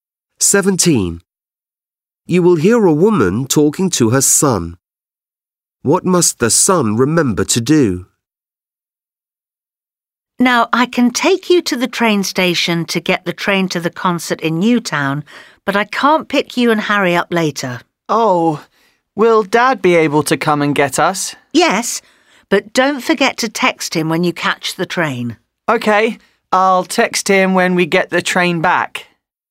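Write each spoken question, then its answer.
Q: What must the son remember to do?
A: Text his dad when they catch the train back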